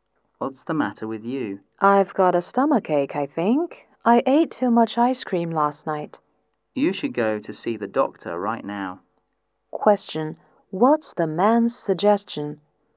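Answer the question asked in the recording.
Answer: Go to see the doctor right now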